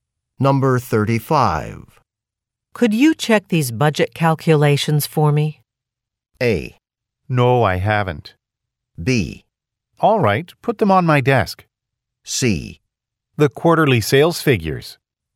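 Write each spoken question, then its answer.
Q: Could you check these budget calculations for me?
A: B: All right, put them on my desk.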